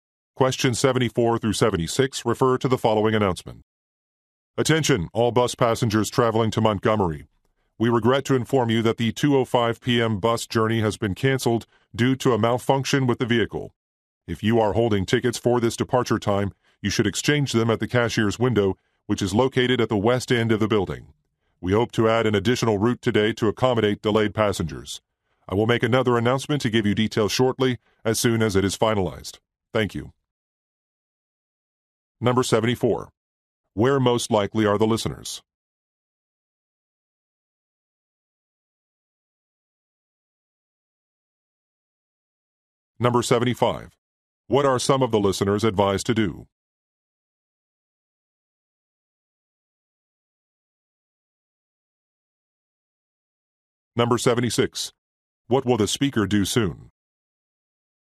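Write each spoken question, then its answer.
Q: Where most likely are the listeners?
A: At a bus station

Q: What are some of the listeners advised to do?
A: Exchange their tickets at the cashier's window

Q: What will the speaker do soon?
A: Make another announcement with details of an additional route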